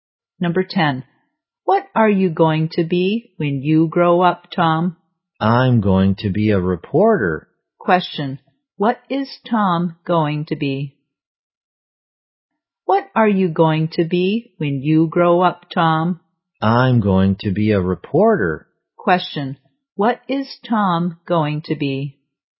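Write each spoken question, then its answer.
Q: Question. What is Tom going to be?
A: A reporter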